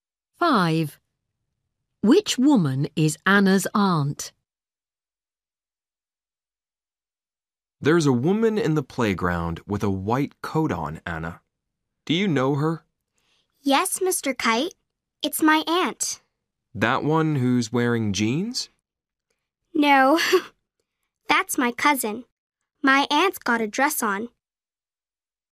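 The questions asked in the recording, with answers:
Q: Which woman is Anna's aunt?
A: the woman with a white coat and a dress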